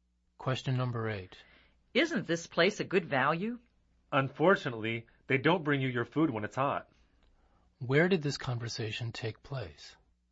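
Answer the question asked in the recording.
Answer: At a restaurant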